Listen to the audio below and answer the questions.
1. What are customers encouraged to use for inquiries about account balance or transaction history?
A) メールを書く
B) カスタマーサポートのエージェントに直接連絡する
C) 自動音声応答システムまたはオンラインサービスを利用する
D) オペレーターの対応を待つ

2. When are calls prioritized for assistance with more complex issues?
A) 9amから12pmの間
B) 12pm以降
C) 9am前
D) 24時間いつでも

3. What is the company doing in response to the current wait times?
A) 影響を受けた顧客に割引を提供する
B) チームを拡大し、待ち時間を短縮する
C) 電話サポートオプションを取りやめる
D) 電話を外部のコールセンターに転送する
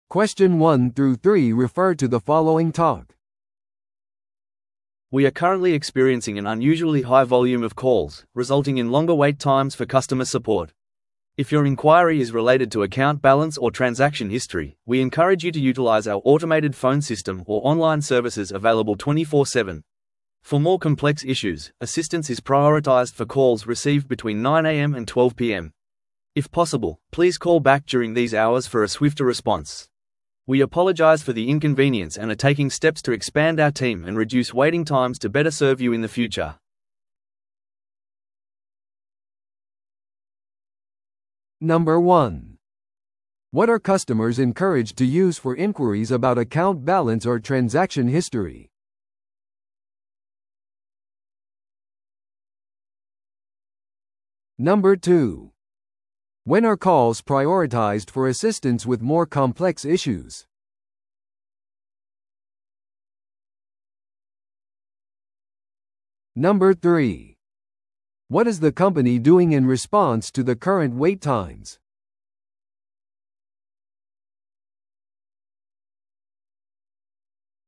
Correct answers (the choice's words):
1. 自動音声応答システムまたはオンラインサービスを利用する
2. 9amから12pmの間
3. チームを拡大し、待ち時間を短縮する

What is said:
We are currently experiencing an unusually high volume of calls, resulting in longer wait times for customer support. If your inquiry is related to account balance or transaction history, we encourage you to utilize our automated phone system or online services available 24/7. For more complex issues, assistance is prioritized for calls received between 9am and 12pm. If possible, please call back during these hours for a swifter response. We apologize for the inconvenience and are taking steps to expand our team and reduce waiting times to better serve you in the future.